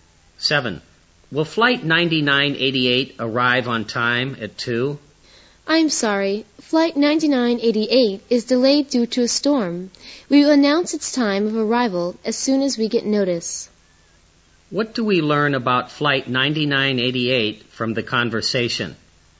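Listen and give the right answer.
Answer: It is delayed because of a storm.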